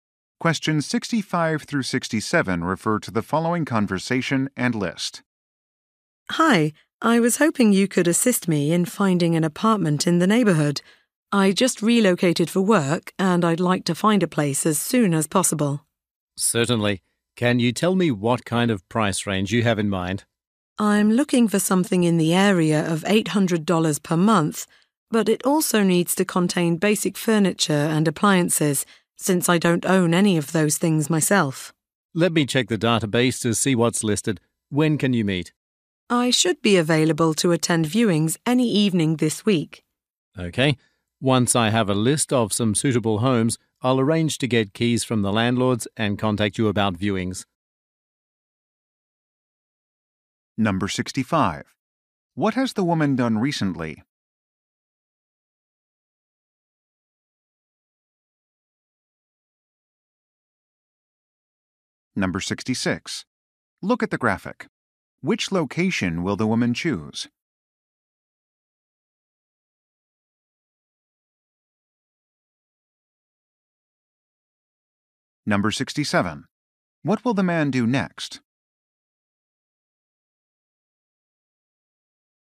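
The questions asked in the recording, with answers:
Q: What has the woman done recently?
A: Moved for work

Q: What will the man do next?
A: Check the database for listings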